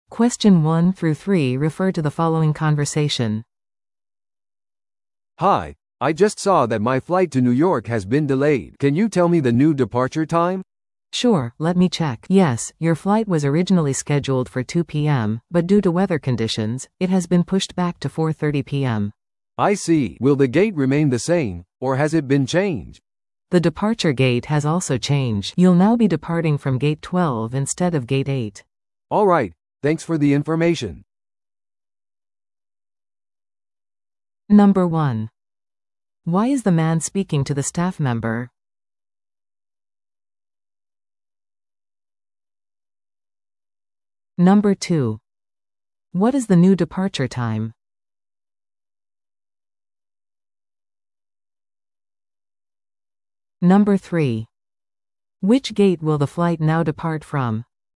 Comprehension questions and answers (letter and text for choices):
Listen to the audio below and answer the questions.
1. Why is the man speaking to the staff member?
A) フライトのチェックインをするため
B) フライトの遅延について確認するため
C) 座席のアップグレードをするため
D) 早めの搭乗パスをリクエストするため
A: B) フライトの遅延について確認するため

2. What is the new departure time?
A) 午後1時30分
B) 午後2時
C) 午後4時30分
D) 午後6時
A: C) 午後4時30分

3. Which gate will the flight now depart from?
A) ゲート6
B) ゲート8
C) ゲート12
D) ゲート15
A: C) ゲート12

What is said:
A: "Hi, I just saw that my flight to New York has been delayed. Can you tell me the new departure time?"
B: "Sure, let me check... Yes, your flight was originally scheduled for 2 PM, but due to weather conditions, it has been pushed back to 4:30 PM."
A: "I see. Will the gate remain the same, or has it been changed?"
B: "The departure gate has also changed. You'll now be departing from Gate 12 instead of Gate 8."
A: "Alright, thanks for the information!"